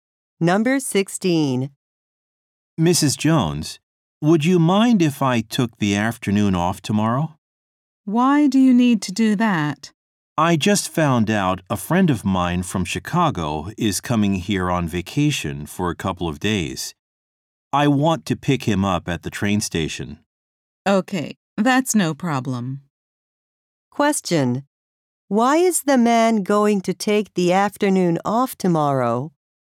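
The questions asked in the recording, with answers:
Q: Why is the man going to take the afternoon off tomorrow?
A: To pick up a friend from Chicago at the train station.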